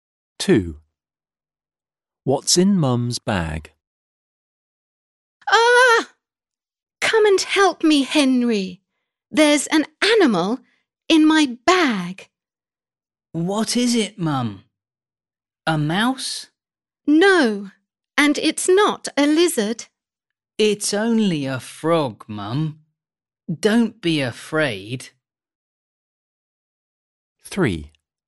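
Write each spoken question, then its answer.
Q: What's in Mum's bag?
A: a frog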